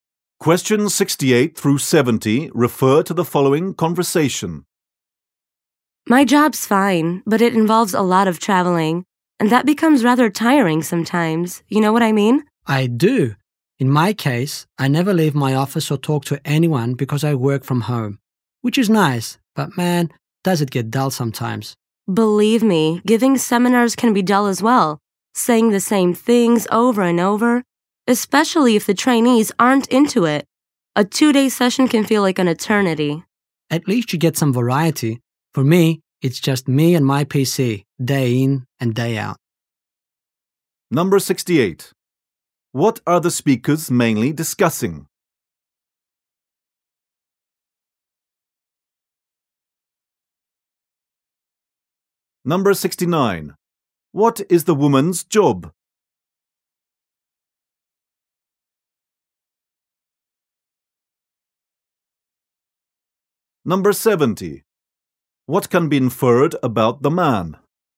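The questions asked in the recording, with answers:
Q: What are the speakers mainly discussing?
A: Their jobs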